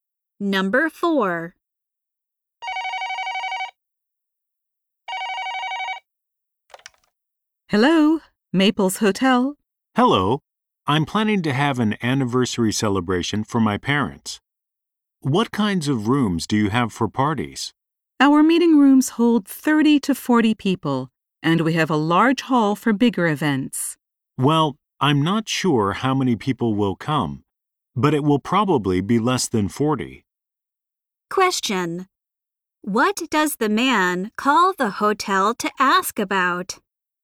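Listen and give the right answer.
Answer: Rooms for a party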